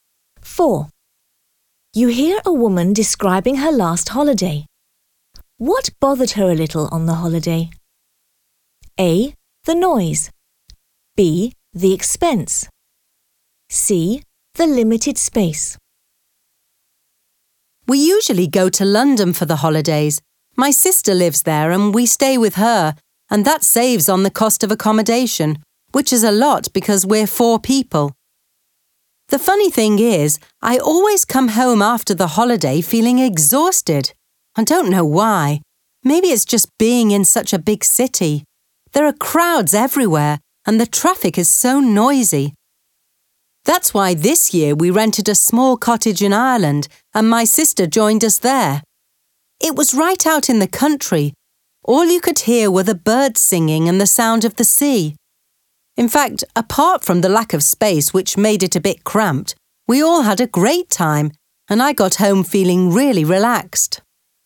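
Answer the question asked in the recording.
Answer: C: The limited space.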